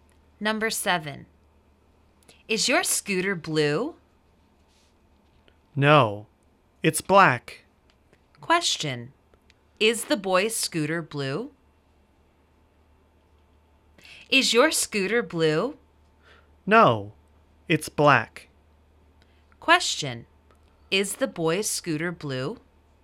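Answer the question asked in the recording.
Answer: No, it's black.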